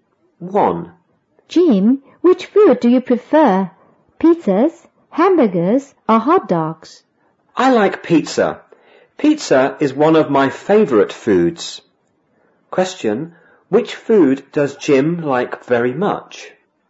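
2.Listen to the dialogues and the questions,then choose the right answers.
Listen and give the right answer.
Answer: Pizza

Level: 五年级下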